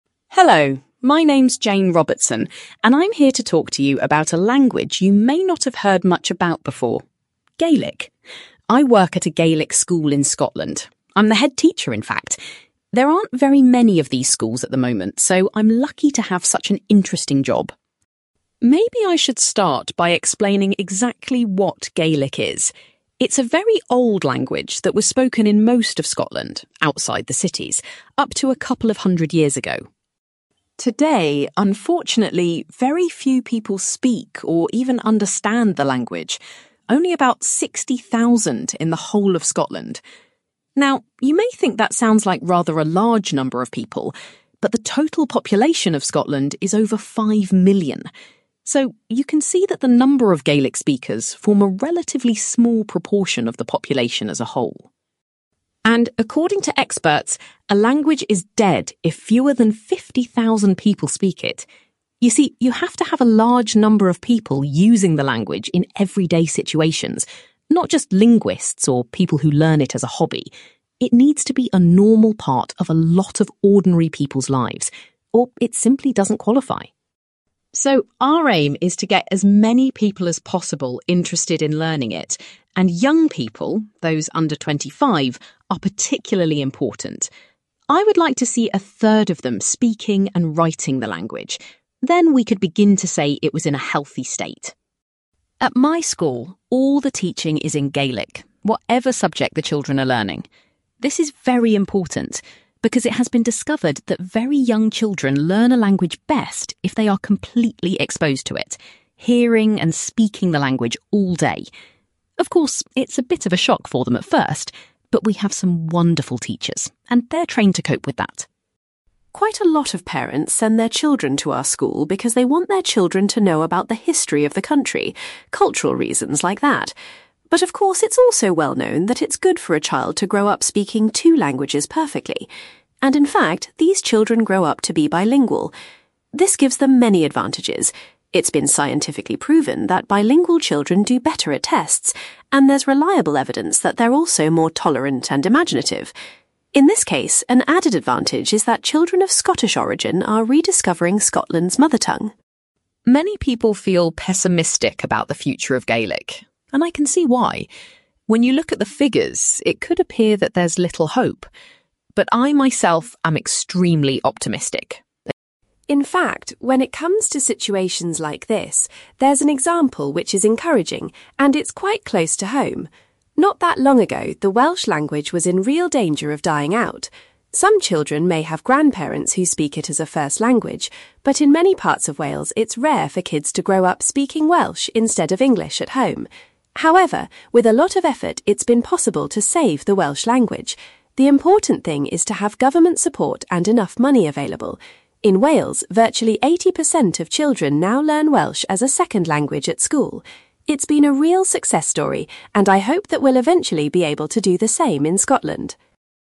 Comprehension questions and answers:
You will hear a woman called Jane Robertson giving a talk about a language called Gaelic. For questions 9-18, complete the sentences with a word or short phrase.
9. Jane is the (9)........................... of a Gaelic school in Scotland.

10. Today approximately (10)........................... people speak Gaelic in Scotland.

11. If fewer than (11)........................... people speak a language, it is considered dead.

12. Jane would like to see one-third of people under 25 speaking and (12)........................... Gaelic.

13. If very young children are exposed to a language (13)..........................., they can learn it most effectively.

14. Some parents send their children to Jane's school for (14)........................... reasons.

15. Jane says that two character traits of bilingual children are being more (15)........................... and tolerant.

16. Jane feels very (16)........................... about the future of Gaelic.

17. Jane says that what is needed is help from (17)........................... .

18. With a lot of effort, nowadays 80% of children learn Welsh as a (18)........................... language.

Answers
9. headteacher
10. 60,000
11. 50,000
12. writing
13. all day
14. cultural
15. imaginative
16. optimistic
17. government
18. second

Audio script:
Jane Robertson: Hello, my name's Jane Robertson, and I'm here to talk to you about a language you may not have heard much about before: Gaelic. I work at a Gaelic school in Scotland - I'm the headteacher, in fact. There aren't very many of these schools at the moment, so I'm lucky to have such an interesting job.
Maybe I should start by explaining exactly what Gaelic is. It's a very old language that was spoken in most of Scotland, outside the cities, up to a couple of hundred years ago.
Today, unfortunately, very few people speak or even understand the language - only about 60,000 in the whole of Scotland. Now you may think that sounds like rather a large number of people, but the total population of Scotland is over 5 million. So you can see that the number of Gaelic speakers form a relatively small proportion of the population as a whole.
And according to experts, a language is dead if fewer than 50,000 people speak it. You see, you have to have a large number of people using the language in everyday situations, not just linguists or people who learn it as a hobby. It needs to be a normal part of a lot of ordinary people's lives, or it simply doesn't qualify.
So our aim is to get as many people as possible interested in learning it. And young people - those under 25 - are particularly important. I would like to see a third of them speaking and writing the language - then we could begin to say it was in a healthy state.
At my school all the teaching is in Gaelic, whatever subject the children are learning. This is very important, because it has been discovered that very young children learn a language best if they are completely exposed to it - hearing and speaking the language all day. Of course, it's a bit of a shock for them at first, but we have some wonderful teachers, and they're trained to cope with that!
Quite a lot of parents send their children to our school because they want their children to know about the history of the country - cultural reasons like that. But of course it's also well known that it's good for a child to grow up speaking two languages perfectly. And in fact, these children grow up to be bilingual. This gives them many advantages. It's been scientifically proven that bilingual children do better at tests, and there's reliable evidence that they're also more tolerant and imaginative. In this case, an added advantage is that children of Scottish origin are rediscovering Scotland's mother tongue.
Many people feel pessimistic about the future of Gaelic, and I can see why, when you look at the figures, it could appear that there's little hope. But I myself am extremely optimistic.
In fact, when it comes to situations like this, there's an example which is encouraging, and it's quite close to home. Not that long ago, the Welsh language was in real danger of dying out. Some children may have grandparents who speak it as a first language, but in many parts of Wales it's rare for kids to grow up speaking Welsh instead of English at home. However, with a lot of effort it's been possible to save the Welsh language. The important thing is to have government support and enough money available. In Wales, virtually 80% of children now learn Welsh as a second language at school. It's been a real success story and I hope that we'll eventually be able to do the same in Scotland ...

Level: B2